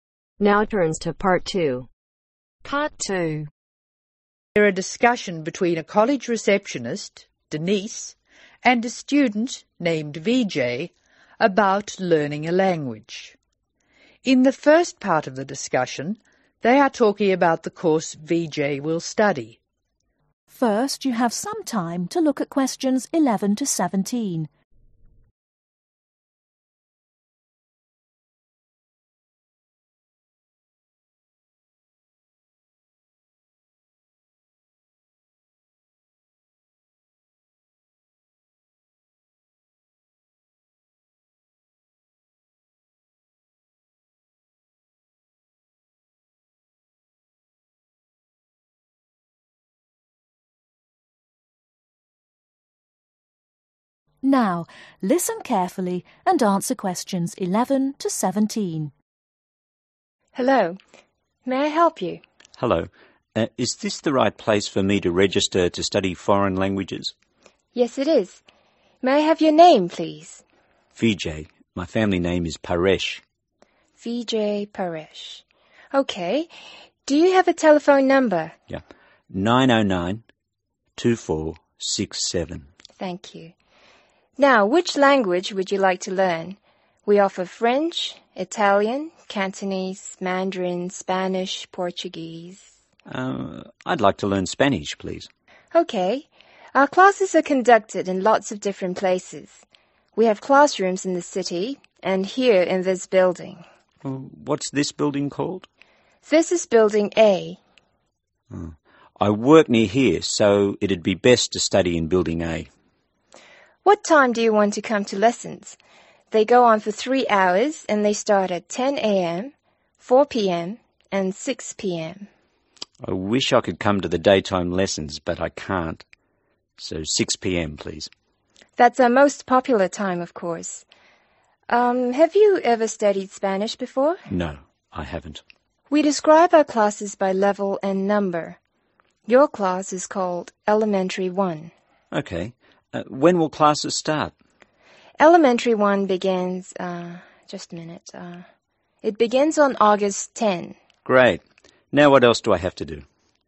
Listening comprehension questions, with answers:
Complete the table below. Write NO MORE THAN TWO WORDS OR A NUMBER for each answer.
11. Name of Applicant: (11)............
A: Vijay Paresh

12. Telephone number: (12)............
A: 9092467

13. Language to be learned: (13)............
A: Spanish

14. Location of class: (14)............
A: Building A

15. Time of class: (15)............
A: 6 pm

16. Name of class: (16)............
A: Elementary one

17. Date of commencement of class: (17)............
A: 10th August